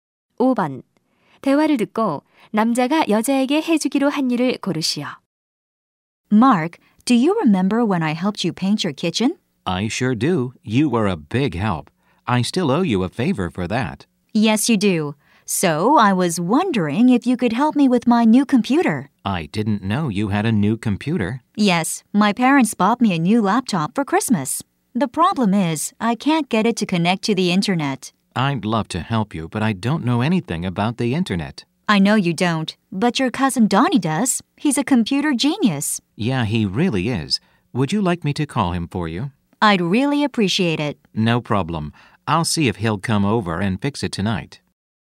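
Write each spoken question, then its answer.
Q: 대화를 듣고 남자가 여자에게 해주기로 한 일을 고르시오.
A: 사촌 Donnie에게 전화해 주기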